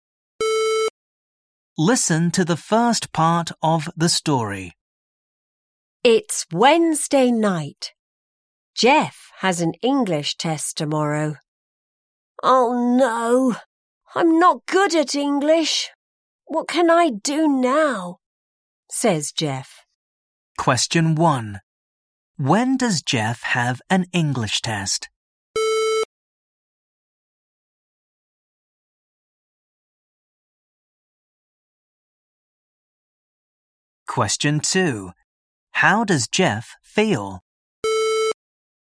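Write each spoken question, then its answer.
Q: When does Jeff have an English test?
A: Thursday (tomorrow)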